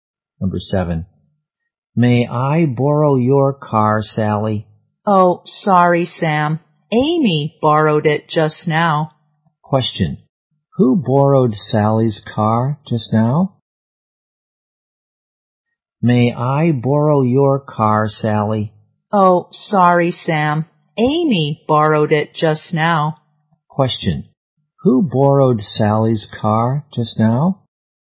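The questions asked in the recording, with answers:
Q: Who borrowed Sally's car just now?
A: Amy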